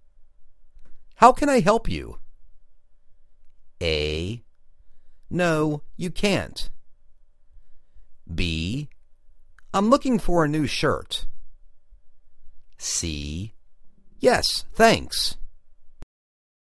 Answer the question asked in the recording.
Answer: I' m looking for a new shirt